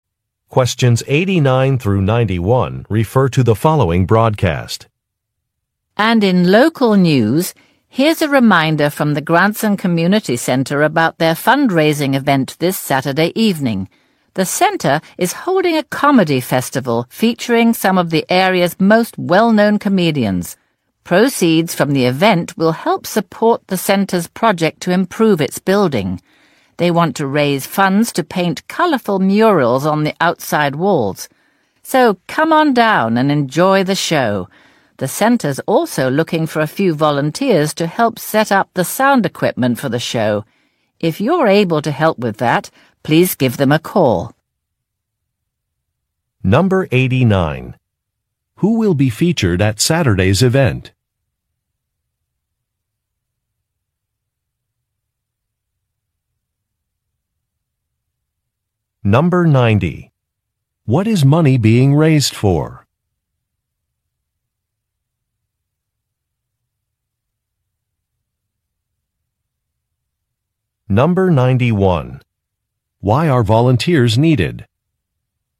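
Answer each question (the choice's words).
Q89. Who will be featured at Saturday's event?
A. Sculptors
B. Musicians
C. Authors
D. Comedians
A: Comedians

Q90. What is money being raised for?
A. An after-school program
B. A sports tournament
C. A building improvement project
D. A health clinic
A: A building improvement project

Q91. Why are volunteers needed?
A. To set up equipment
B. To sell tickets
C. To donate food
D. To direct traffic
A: To set up equipment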